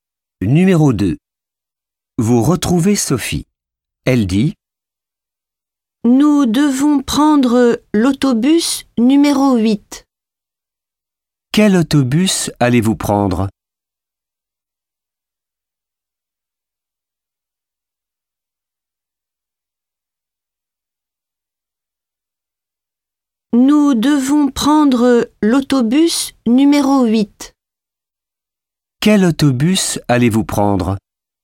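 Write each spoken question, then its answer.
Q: Quel autobus allez-vous prendre?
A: l'autobus numéro 8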